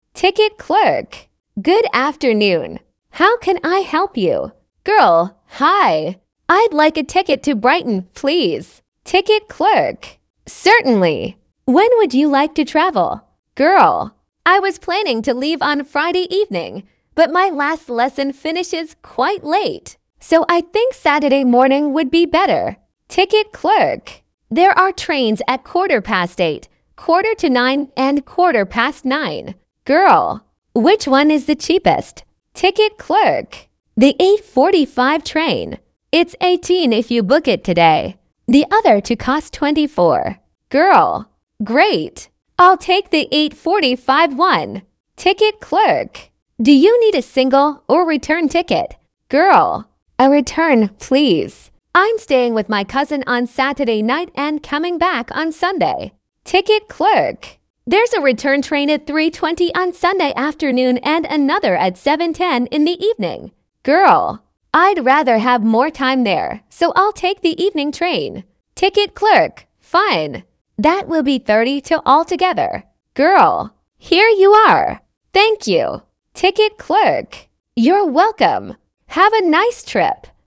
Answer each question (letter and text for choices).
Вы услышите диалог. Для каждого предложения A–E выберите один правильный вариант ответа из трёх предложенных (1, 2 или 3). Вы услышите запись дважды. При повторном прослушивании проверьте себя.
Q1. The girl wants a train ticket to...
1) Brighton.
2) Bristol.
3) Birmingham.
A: 1) Brighton.

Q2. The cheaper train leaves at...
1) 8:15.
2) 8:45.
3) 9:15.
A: 2) 8:45.

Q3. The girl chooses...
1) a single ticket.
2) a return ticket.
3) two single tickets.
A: 2) a return ticket.

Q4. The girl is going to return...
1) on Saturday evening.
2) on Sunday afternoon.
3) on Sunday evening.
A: 3) on Sunday evening.

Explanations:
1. Девушка сразу говорит, что ей нужен билет до Брайтона: I'd like a ticket to Brighton.
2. Самый дешёвый поезд отправляется в 8:45.
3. Девушка выбирает билет туда и обратно: A return, please.
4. В воскресенье она выбирает более поздний поезд в 7:10 вечера, чтобы провести больше времени у двоюродной сестры.

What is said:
Ticket clerk: Good afternoon. How can I help you?
Girl: Hi. I'd like a ticket to Brighton, please.
Ticket clerk: Certainly. When would you like to travel?
Girl: I was planning to leave on Friday evening, but my last lesson finishes quite late. So I think Saturday morning would be better.
Ticket clerk: There are trains at quarter past eight, quarter to nine and quarter past nine.
Girl: Which one is the cheapest?
It's £18 if you book it today. The other two cost £24.
Girl: Great. I'll take the 8:45 one.
Ticket clerk: Do you need a single or return ticket?
Girl: A return, please. I'm staying with my cousin on Saturday night and coming back on Sunday.
Ticket clerk: There's a return train at 3:20 on Sunday afternoon and another at 7:10 in the evening.
Girl: I'd rather have more time there, so I'll take the evening train.
Ticket clerk: Fine. That will be £32 altogether.
Girl: Here you are. Thank you.
Ticket clerk: You're welcome. Have a nice trip!